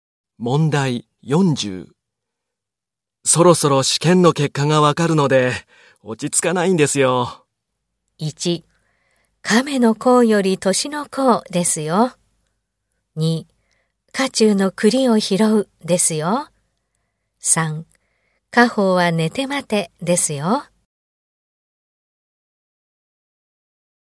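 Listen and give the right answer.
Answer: 3: 果報は寝て待てですよ。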